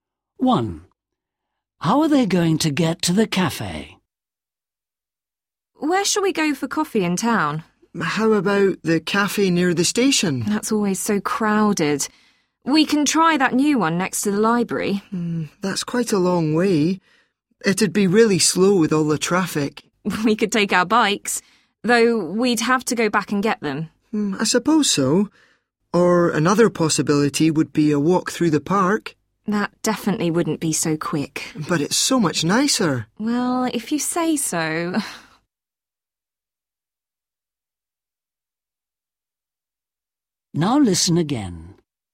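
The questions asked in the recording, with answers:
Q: How are they going to get to the cafe?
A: They are going to walk through the park.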